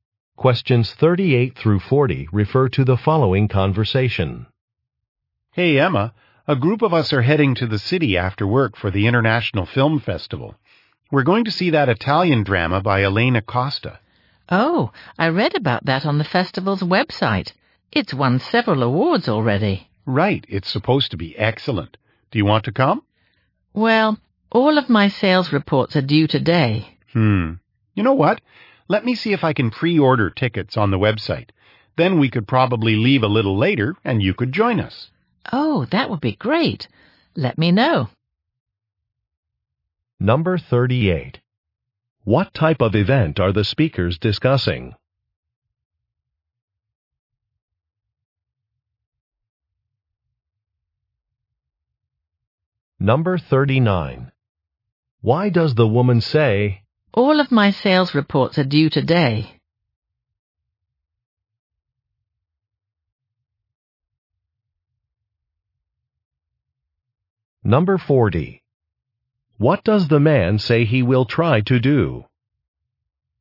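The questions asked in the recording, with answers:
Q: What type of event are the speakers discussing?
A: A film festival

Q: Why does the woman say, "All of my sales reports are due today"?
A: She is too busy to leave with them after work

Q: What does the man say he will try to do?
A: Pre-order tickets on the website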